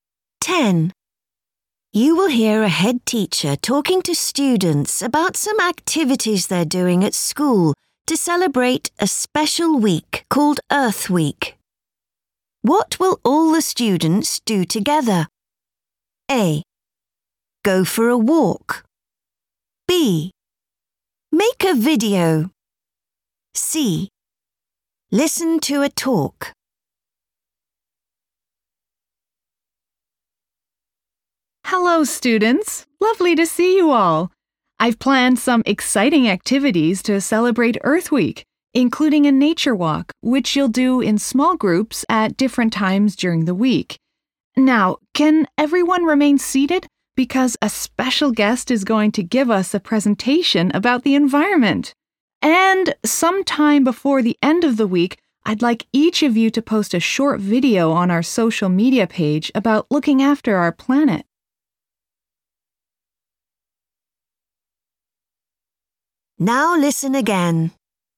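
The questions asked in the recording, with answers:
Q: What will all the students do together?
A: C: Listen to a talk.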